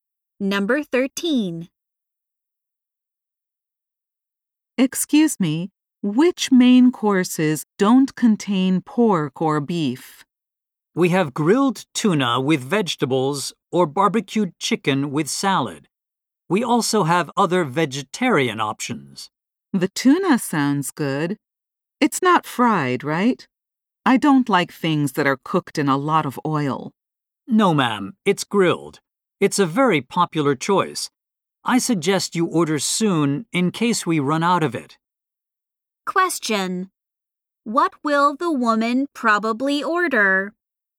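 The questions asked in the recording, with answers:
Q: What will the woman probably order?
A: The grilled tuna with vegetables.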